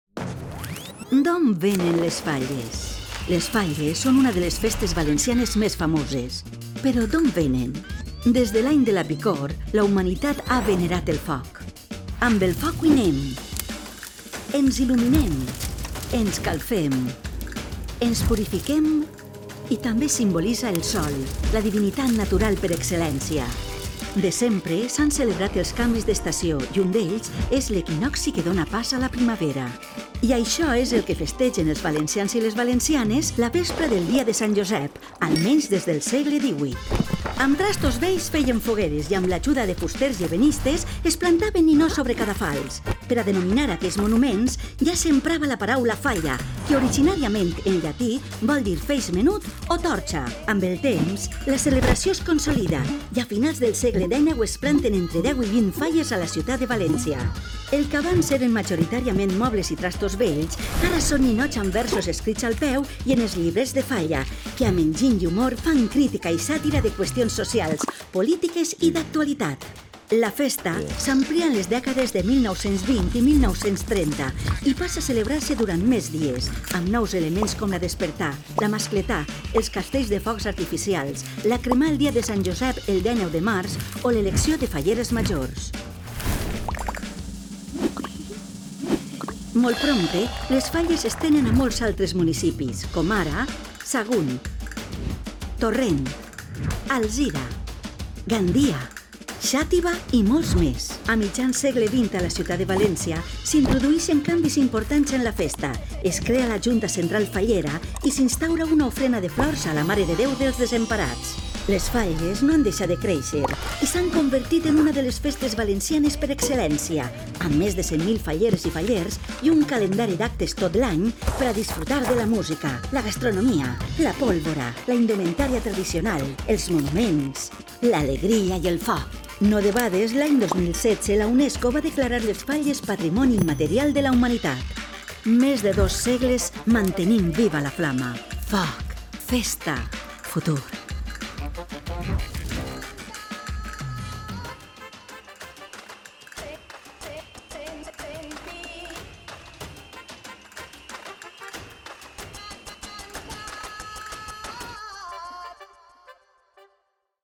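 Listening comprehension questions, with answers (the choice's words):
Escriviu al buit la lletra correcta. Tingueu en compte que, per a cada qüestió plantejada, només hi ha una resposta correcta.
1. La humanitat ha venerat el foc des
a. del paleolític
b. de temps remots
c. de l'any de la pesta bubònica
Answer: de temps remots

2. El foc serveix per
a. cuinar, il·luminar-se, calfar-se i purificar-se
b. cuinar, caçar, higienitzar-se i celebrar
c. alimentar-se, protegir-se i fer ritus amb el Sol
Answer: cuinar, il·luminar-se, calfar-se i purificar-se

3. La vespra del dia de Sant Josep, se celebra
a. el canvi d'estació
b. el naixement del sant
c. el comiat dels mals auguris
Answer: el canvi d'estació

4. Els vestigis de les falles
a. provenen del s. XVII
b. eren muntons de mobles i elements de fusta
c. consistien a muntar estàtues damunt de cadafals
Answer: eren muntons de mobles i elements de fusta

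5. A finals del s. XIX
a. es planten entre una desena i una vintena de falles a la ciutat de València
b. s'ha consolidat la festa de les falles pràcticament com hui la coneixem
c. més de cinc localitats valencianes ja plantaven falles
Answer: es planten entre una desena i una vintena de falles a la ciutat de València

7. La creació de la Junta Central Fallera i de l'ofrena de flors a la Mare de Déu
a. s'establí a mitjan del segle XIX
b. s'establí a València a mitjan del s. XX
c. aparegueren als anys 80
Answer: s'establí a València a mitjan del s. XX

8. Les falles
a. s'han convertit en la principal festa dels valencians, Patrimoni de la Humanitat des de 2016.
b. són una de les festes valencianes més reconegudes, Patrimoni de la Humanitat des de 2016.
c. són una de les festes valencianes més reconegudes, Patrimoni de la Humanitat des de 2019.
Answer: són una de les festes valencianes més reconegudes, Patrimoni de la Humanitat des de 2016.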